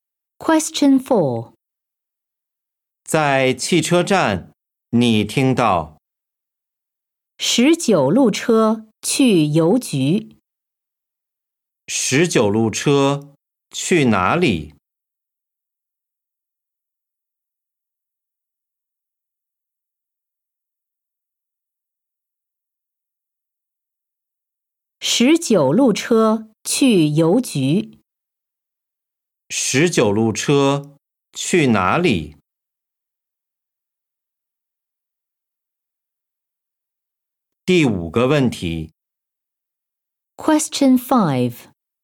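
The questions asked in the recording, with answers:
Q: 十九路车去哪里?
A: 邮局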